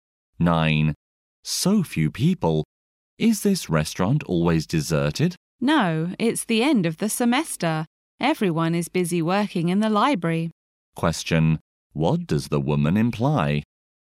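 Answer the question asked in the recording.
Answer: Students are busy studying in the library at the end of the semester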